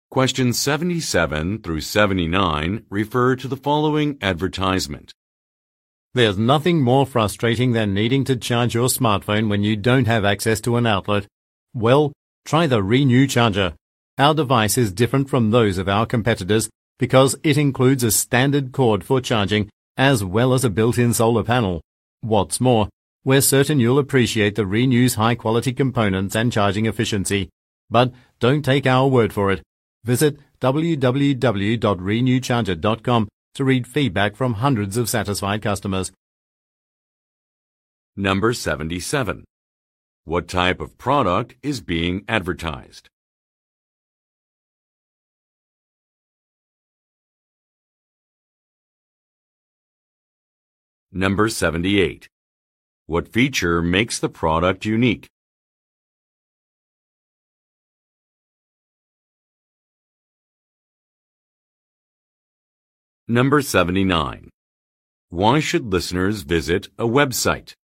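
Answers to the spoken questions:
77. A phone charger
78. It has a built-in solar panel as well as a standard charging cord
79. To read customer feedback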